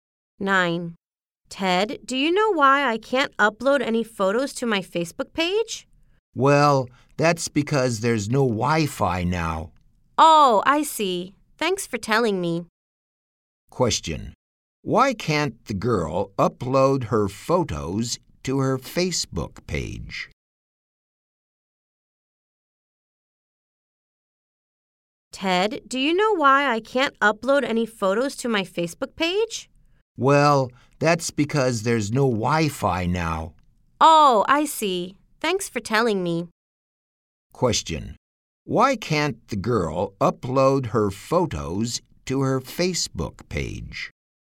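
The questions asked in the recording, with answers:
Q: Why can't the girl upload her photos to her Facebook page?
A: There's no Wi-Fi now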